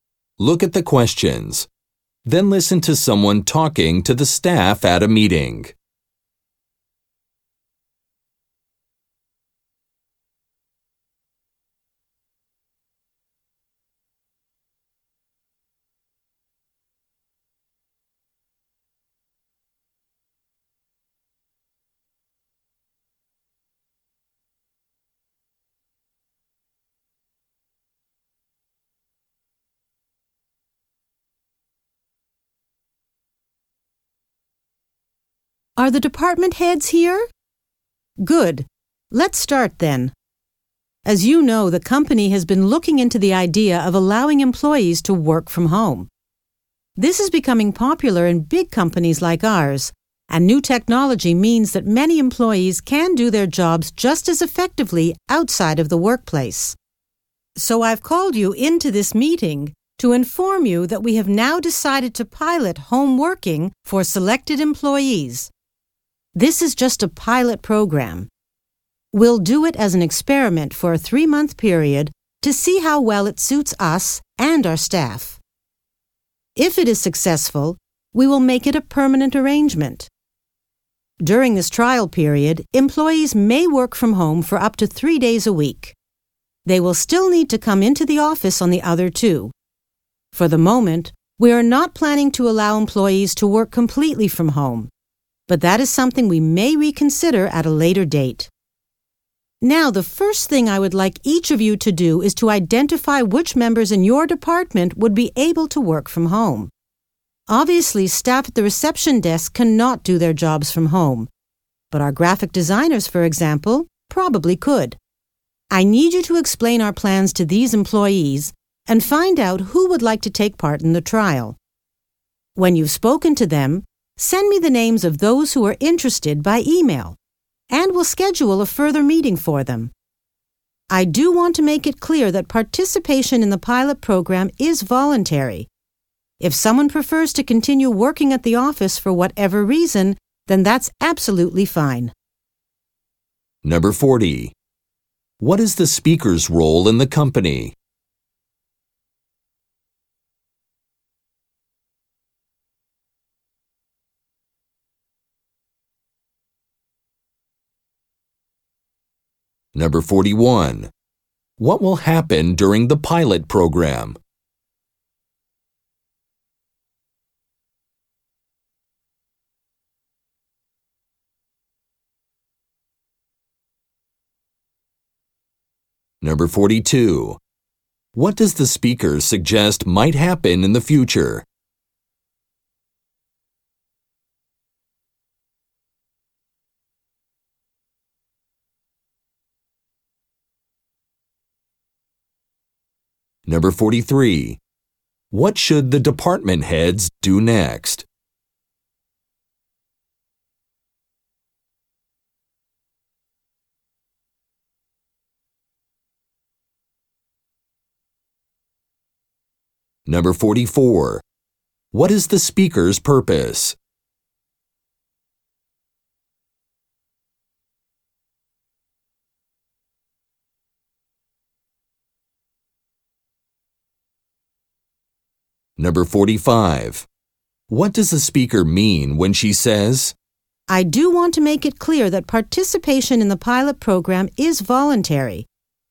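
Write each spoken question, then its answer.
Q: What will happen during the pilot program?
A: Selected staff may work from home up to 3 days a week

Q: What does the speaker suggest might happen in the future?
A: Staff might be allowed to work completely from home

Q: What should the department heads do next?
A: Identify staff who could work from home

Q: What is the speaker's purpose?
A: To announce a pilot home-working program

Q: What does the speaker mean when she says,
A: Employees don't have to take part if they don't want to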